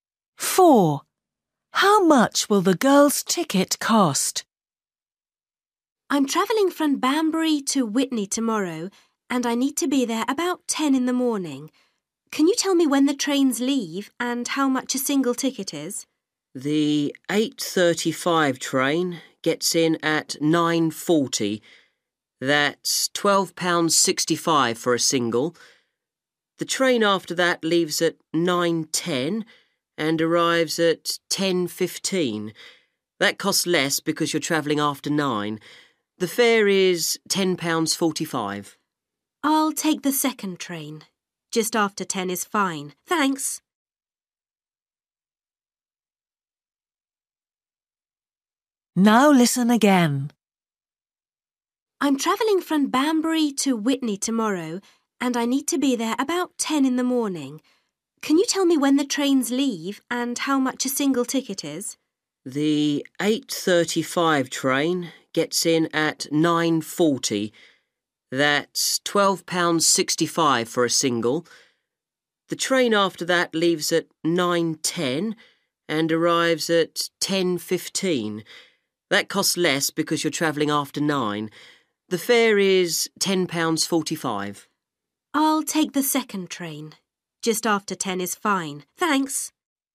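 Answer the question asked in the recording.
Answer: £10.45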